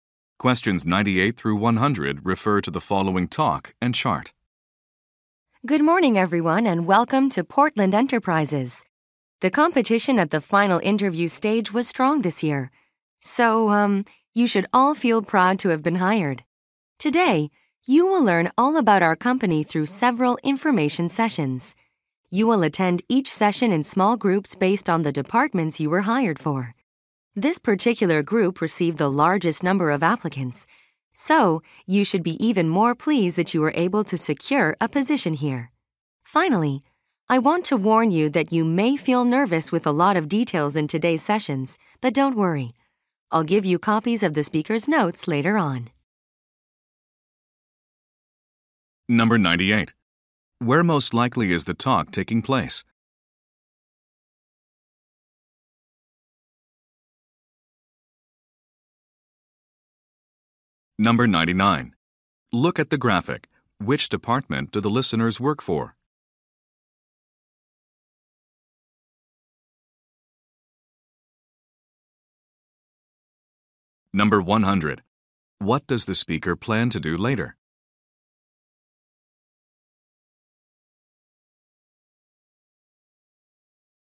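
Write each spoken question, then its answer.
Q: Where most likely is the talk taking place?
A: At a new employee orientation

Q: What does the speaker plan to do later?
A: Give out copies of the speaker's notes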